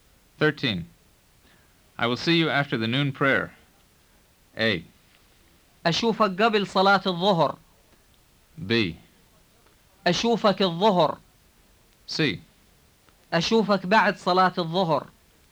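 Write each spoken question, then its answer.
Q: I will see you after the noon prayer.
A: C: أشوفك بعد صلاة الظهر.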